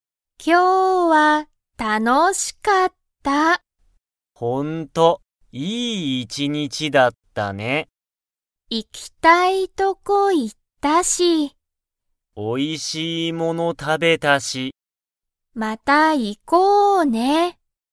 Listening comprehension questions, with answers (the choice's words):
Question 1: アキとハルトは、おいしいものを食(た)べましたか?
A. はい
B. いいえ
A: はい

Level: Level 1